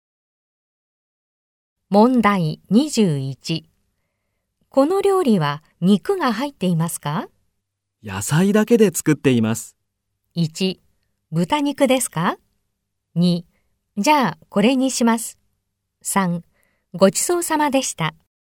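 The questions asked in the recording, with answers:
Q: この料理は肉が入っていますか?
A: 2: じゃあ、これにします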